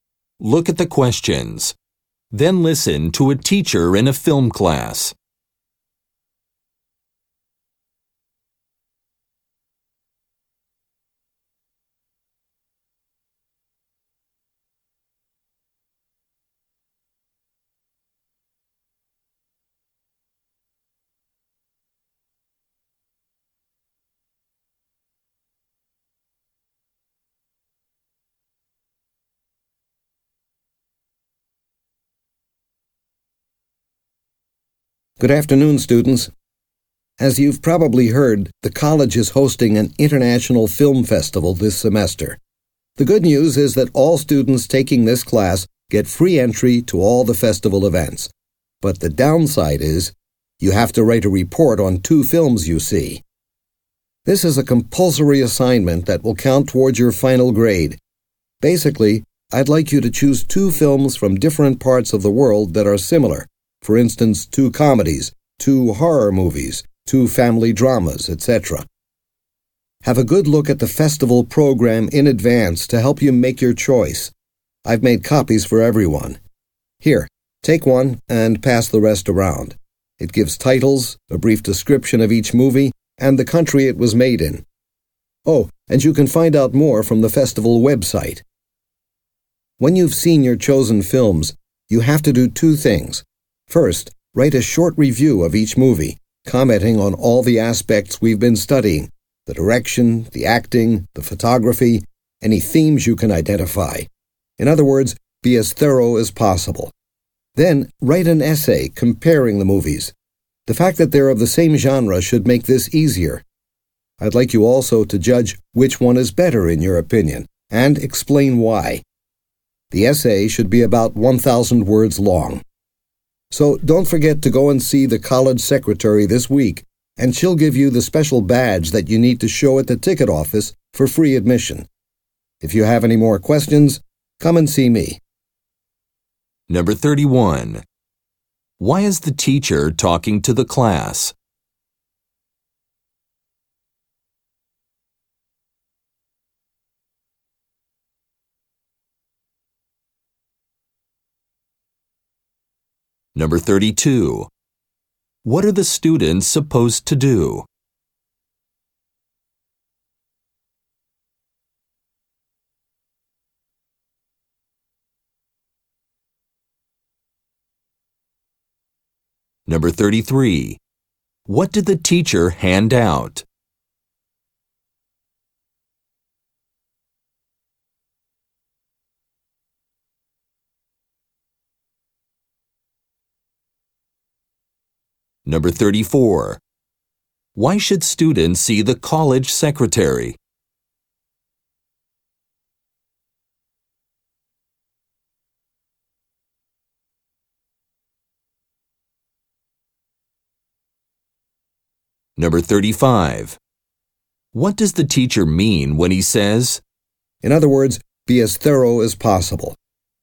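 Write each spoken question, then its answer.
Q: Why is the teacher talking to the class?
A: To explain an assignment about the film festival

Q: What are the students supposed to do?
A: See two similar films from different countries and write reviews and a comparison essay

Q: What did the teacher hand out?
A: Copies of the festival program

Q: Why should students see the college secretary?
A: To get a badge for free admission

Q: in other words, be as thorough as possible?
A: Students should comment on all aspects in detail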